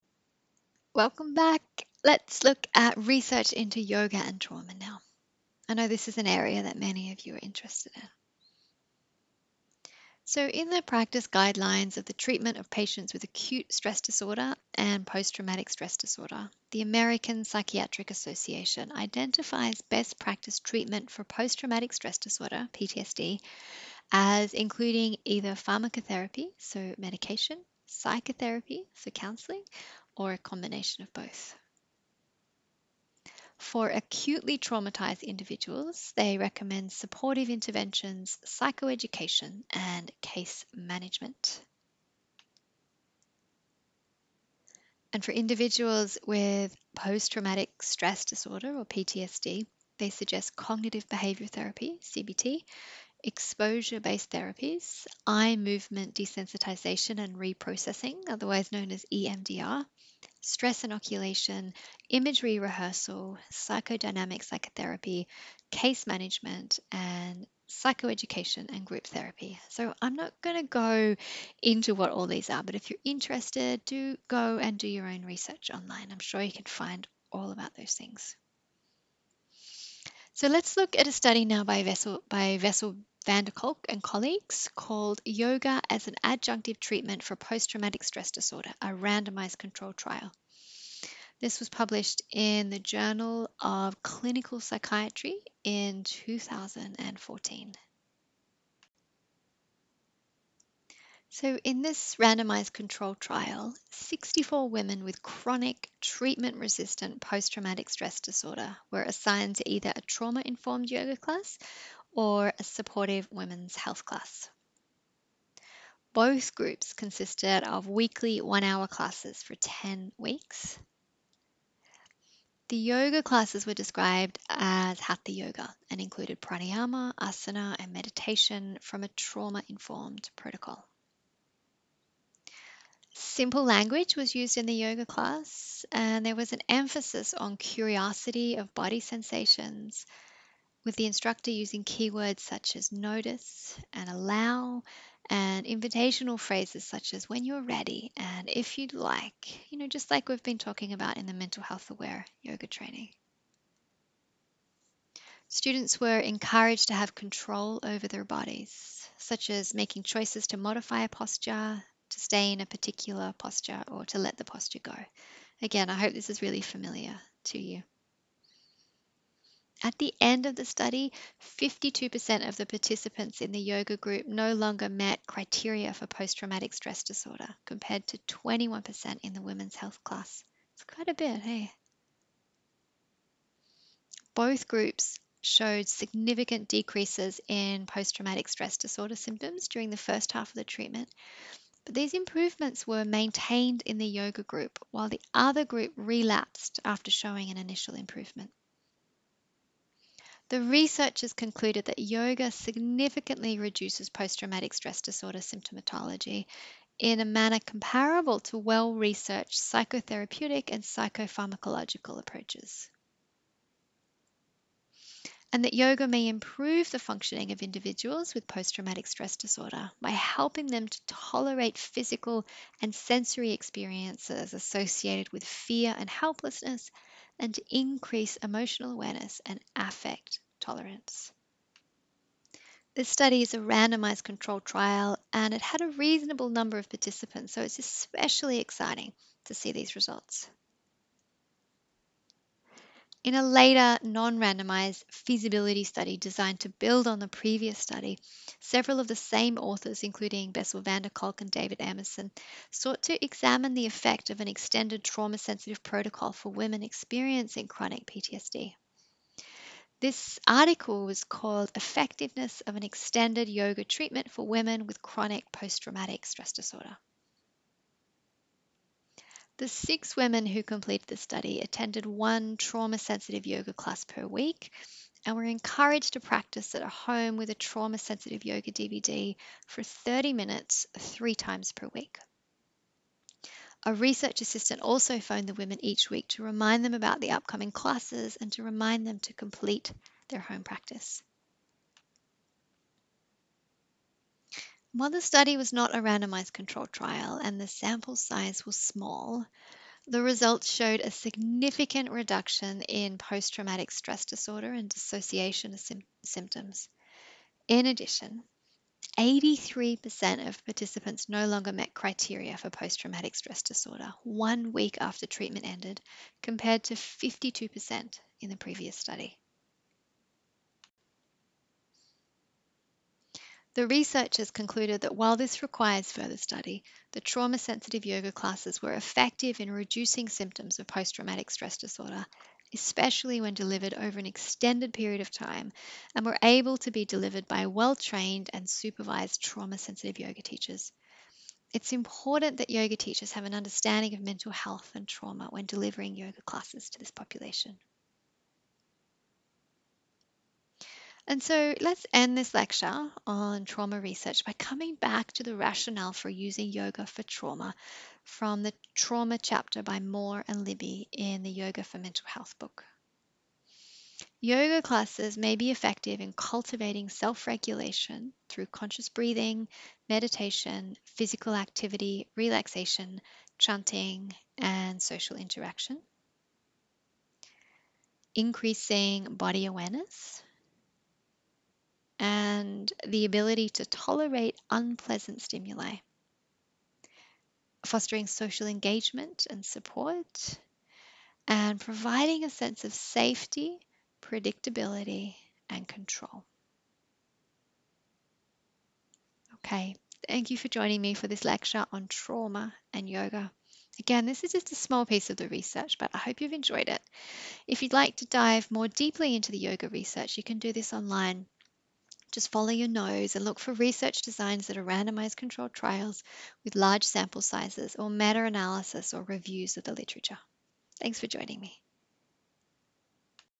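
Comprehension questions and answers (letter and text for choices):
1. What does the American Psychiatric Association recommend for the treatment of trauma?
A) Pharmacotherapy, psychotherapy, or a combination of both.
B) Cognitive Behaviour Therapy, exposure-based therapies, Eye Movement Desensitization and Reprocessing (EMDR), stress inoculation, imagery rehearsal, Psychodynamic psychotherapy.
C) Case management and psycho-education and group therapy.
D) All of the above.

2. In the 2017 study by Van Der Kolk and colleagues with women with chronic Posttraumatic Stress Disorder (PTSD), what did the researchers conclude?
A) Further study is required to more fully understand the effects of yoga for individuals with PTSD.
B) The yoga classes were effective in reducing symptoms of PTSD, especially when delivered over an extended period of time.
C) It is important that the classes are delivered by well-trained and supervised yoga teachers.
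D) All of the above.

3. What is the rationale for using yoga for trauma?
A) Yoga increases body awareness and the ability to tolerate unpleasant stimuli.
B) Yoga fosters social engagement and support and provides a sense of safety, predictability and control.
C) All of the above.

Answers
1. D) All of the above.
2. D) All of the above.
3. C) All of the above.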